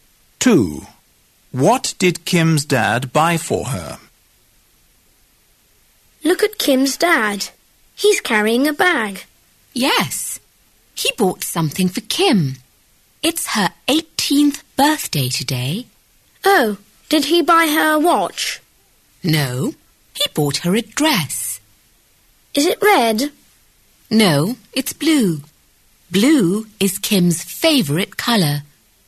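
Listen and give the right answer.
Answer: A blue dress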